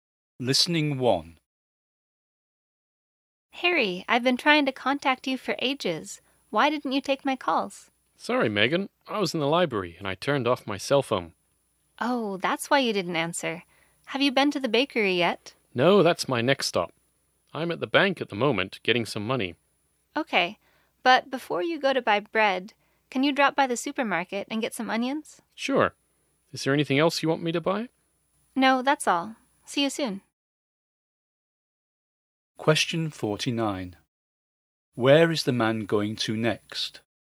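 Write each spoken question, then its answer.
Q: Where is the man going to next?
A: The supermarket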